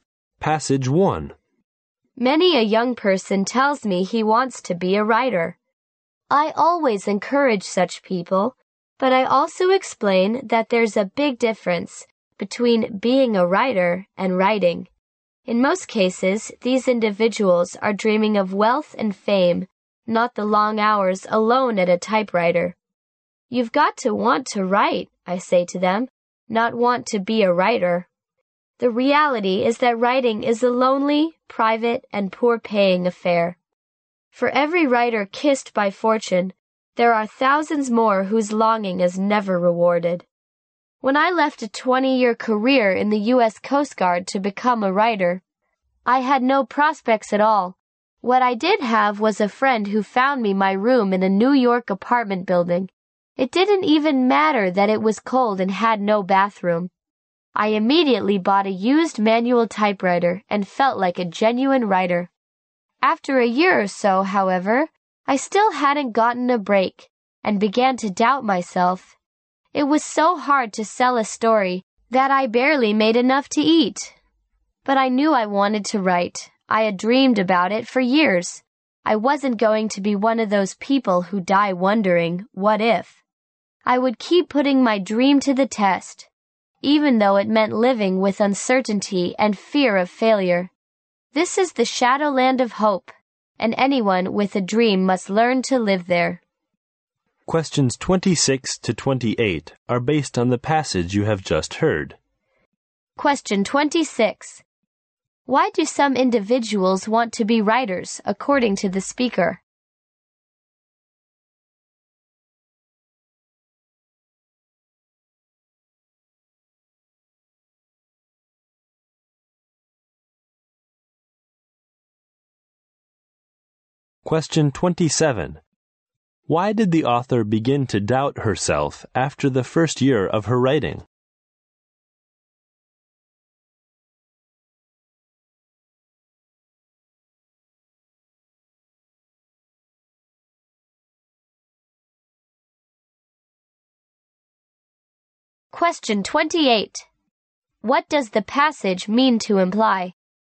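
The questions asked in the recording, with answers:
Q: Why do some individuals want to be writers, according to the speaker?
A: They dream of wealth and fame.

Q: Why did the author begin to doubt herself after the first year of her writing?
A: It was hard to sell her stories, and she barely earned enough to eat.

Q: What does the passage mean to imply?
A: Anyone with a dream must keep trying and learn to live with uncertainty and the fear of failure.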